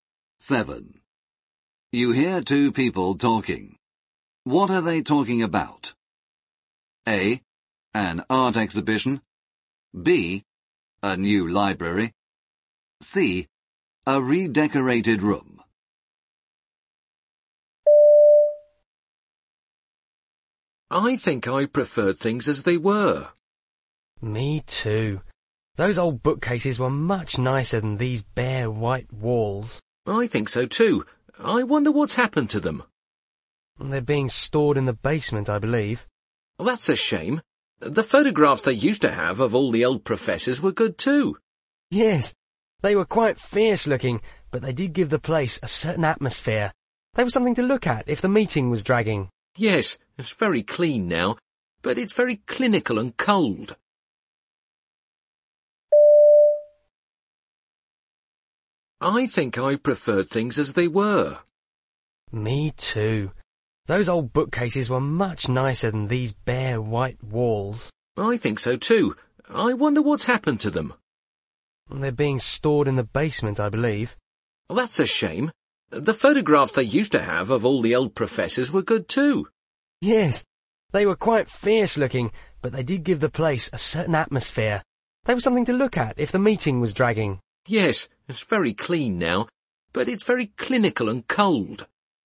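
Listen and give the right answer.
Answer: C: A redecorated room.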